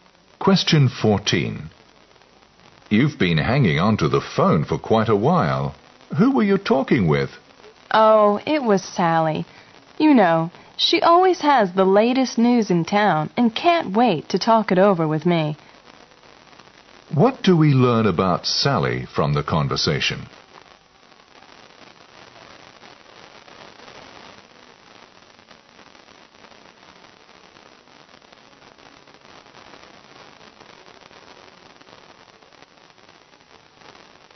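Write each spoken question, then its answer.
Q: What do we learn about Sally from the conversation?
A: She always has the latest news and loves to share it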